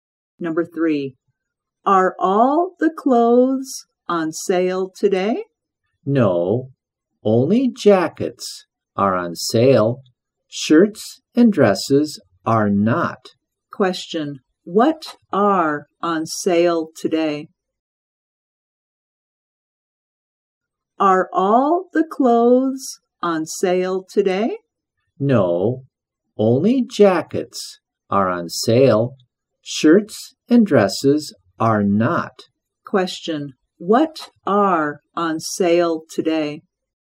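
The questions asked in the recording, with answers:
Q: Question, what are on sale today?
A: Jackets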